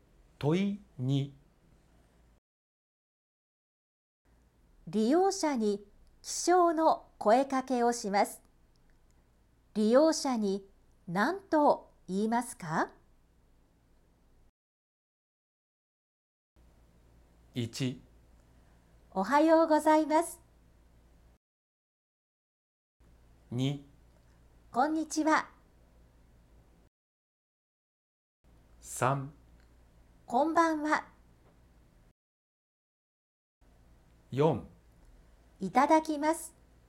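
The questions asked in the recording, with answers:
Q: 利用者に起床の声かけをします。利用者に何と言いますか?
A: 1: おはようございます。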